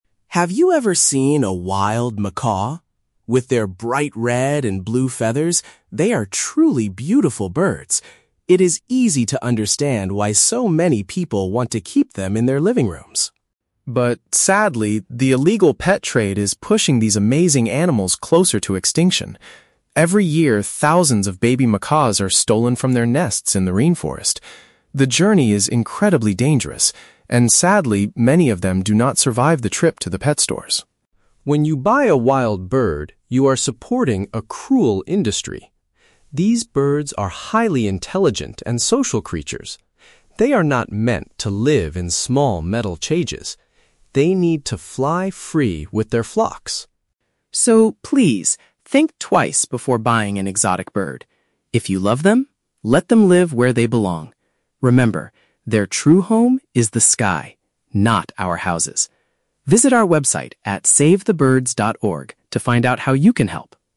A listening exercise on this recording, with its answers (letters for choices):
Listen to a public service announcement on TV and choose the best answer (A, B, or C) for each question.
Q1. According to the speaker, why is the macaw population decreasing?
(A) Their natural forest habitats are being destroyed by farmers.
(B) People are capturing them from the wild to sell as pets.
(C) They are unable to find enough food to feed their families.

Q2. What tragic event happens to many baby macaws?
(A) They die before they even reach the shops.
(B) They are placed in small metal cages at the zoo.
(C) They easily forget how to fly with their flocks.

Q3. What is the core message the advertisement wants to deliver?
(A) You should only buy exotic birds from a legal website.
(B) Macaws are the most intelligent animals in the rainforest.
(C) Wild birds belong in nature, not indoors as pets.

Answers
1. B
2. A
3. C

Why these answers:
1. The speaker mentions that the "illegal pet trade" is pushing them to extinction because babies are "stolen from their nests." Option B paraphrases this as "capturing them from the wild to sell as pets."
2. The speaker states that "many of them do not survive the trip to the pet stores." Option A uses synonyms: "die" (do not survive) and "reach the shops" (trip to the pet stores).
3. The speaker concludes with "their true home is the sky, not our houses." Option C paraphrases this perfectly as "belong in nature, not indoors."

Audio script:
Voice-over Actor: Have you ever seen a wild macaw? With their bright red and blue feathers, they are truly beautiful birds. It is easy to understand why so many people want to keep them in their living rooms.
But sadly, the illegal pet trade is pushing these amazing animals closer to extinction. Every year, thousands of baby macaws are stolen from their nests in the rainforest. The journey is incredibly dangerous, and sadly, many of them do not survive the trip to the pet stores.
When you buy a wild bird, you are supporting a cruel industry. These birds are highly intelligent and social creatures. They are not meant to live in small metal cages. They need to fly free with their flocks.
So, please, think twice before buying an exotic bird. If you love them, let them live where they belong. Remember, their true home is the sky, not our houses. Visit our website at savethebirds.org to find out how you can help.